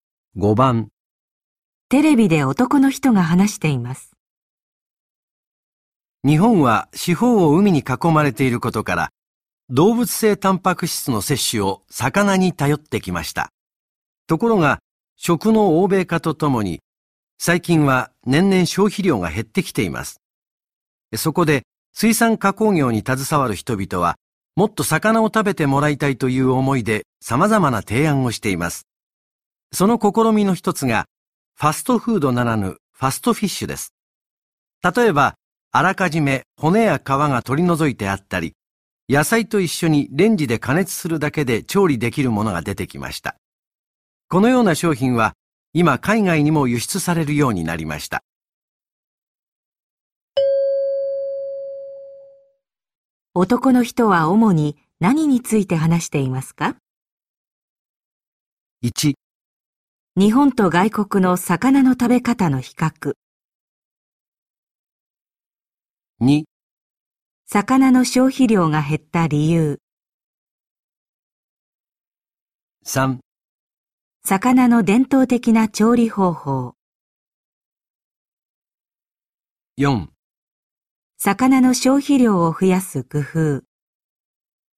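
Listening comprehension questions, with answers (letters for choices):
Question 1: 男の人は主に何について話していますか。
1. 日本と外国の魚の食べ方の比較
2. 魚の消費量が減った理由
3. 魚の伝統的な調理方法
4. 魚の消費量を増やす工夫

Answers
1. 4

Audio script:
日本は四方を海に囲まれていることから、動物性たんぱく質の摂取を魚に頼ってきました。ところが、食の欧米化とともに、最近は年々消費量が減ってきています。そこで、水産加工業に携わる人々はもっと魚を食べてもらいたいという思いで、様々な提案をしています。その試みの一つが、ファストフードならぬファストフィッシュです。例えば、あらかじめ骨や皮が取り除いてあったり、野菜と一緒にレンジで加熱するだけで調理できるものが出てきました。このような商品は今海外にも輸出されるようになりました。

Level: N1级别听力题库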